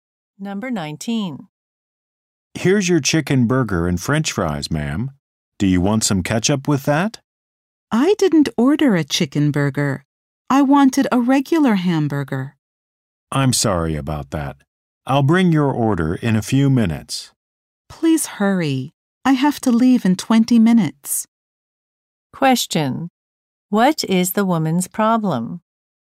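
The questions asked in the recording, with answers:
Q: What is the woman's problem?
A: She got the wrong order, a chicken burger instead of a hamburger.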